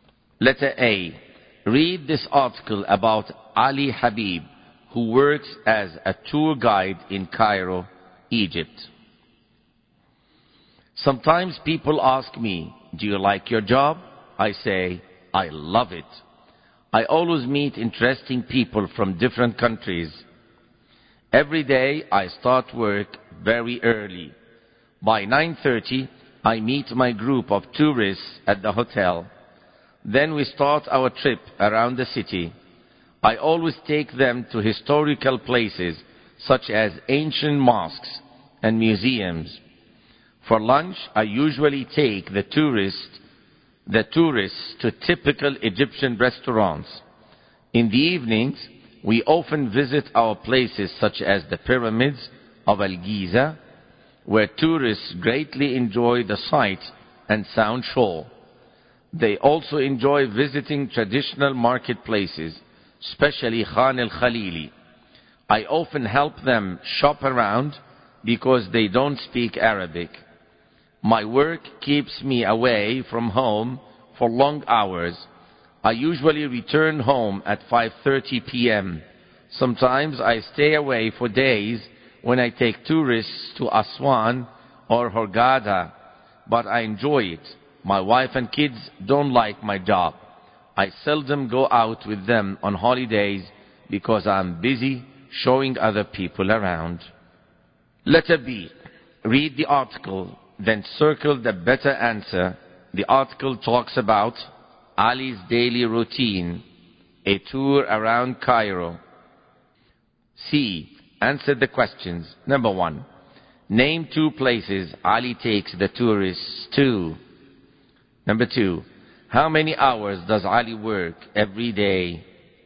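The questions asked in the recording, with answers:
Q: The article talks about Ali's daily routine, a tour around Cairo.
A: Ali's daily routine

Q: Name 2 places Ali takes the tourists to.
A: Ancient mosques and museums (also the pyramids of Al-Giza, Khan al-Khalili)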